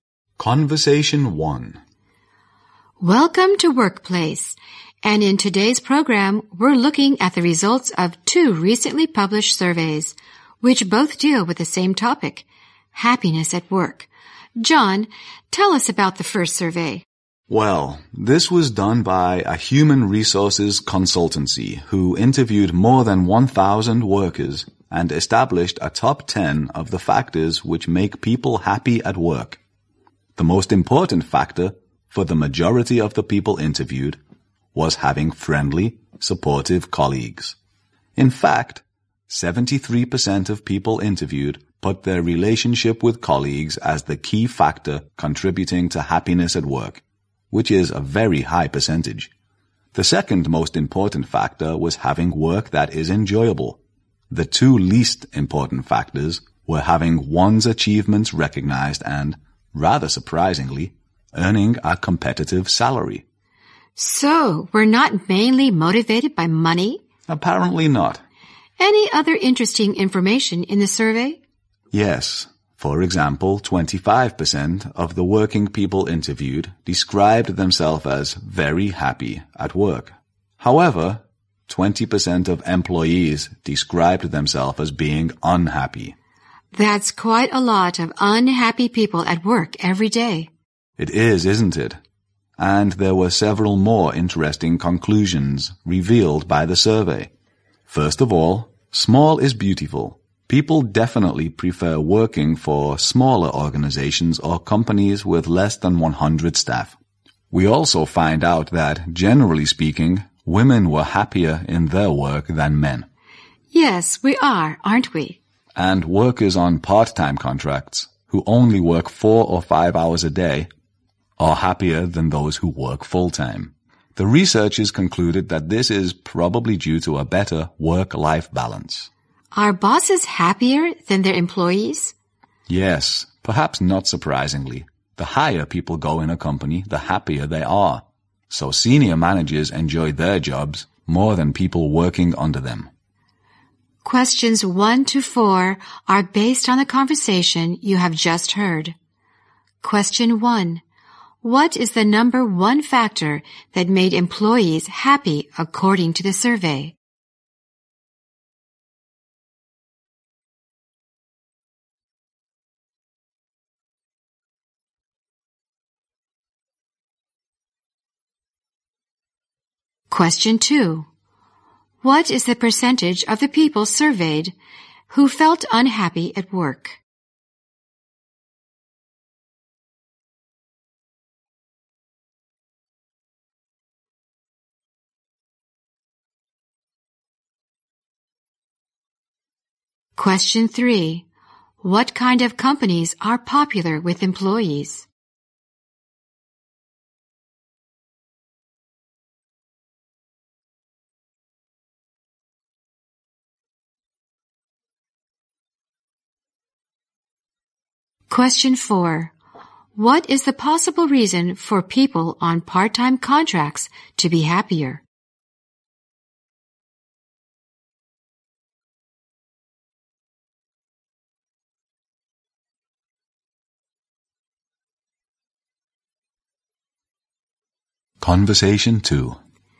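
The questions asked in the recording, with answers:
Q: What is the number one factor that made employees happy according to the survey?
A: Having friendly, supportive colleagues

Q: What is the percentage of the people surveyed who felt unhappy at work?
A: 20%

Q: What kind of companies are popular with employees?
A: Smaller companies with less than 100 staff

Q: What is the possible reason for people on part-time contracts to be happier?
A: A better work-life balance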